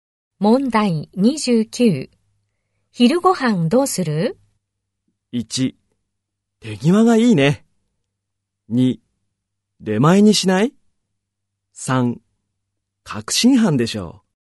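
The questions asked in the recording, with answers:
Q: 昼ごはんどうする?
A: 2: 出前にしない?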